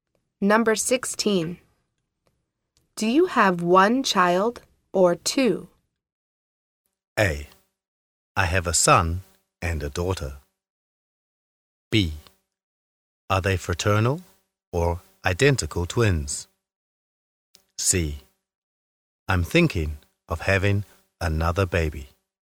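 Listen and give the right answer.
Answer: A: I have a son and a daughter.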